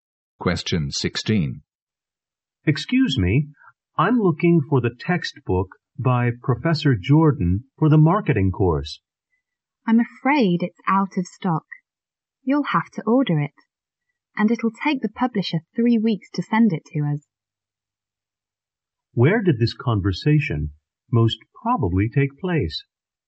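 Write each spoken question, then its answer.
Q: Where did this conversation most probably take place?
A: In a bookstore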